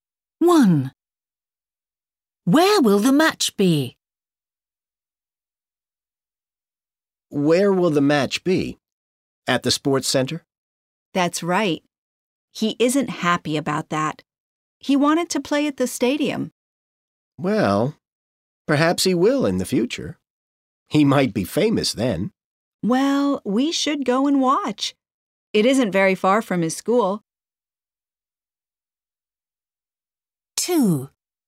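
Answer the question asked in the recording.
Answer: At the sports center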